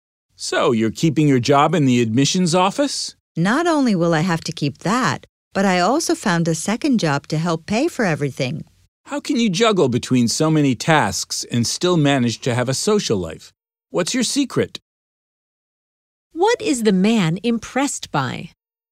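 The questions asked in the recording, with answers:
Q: What is the man impressed by?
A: How she juggles jobs and still has a social life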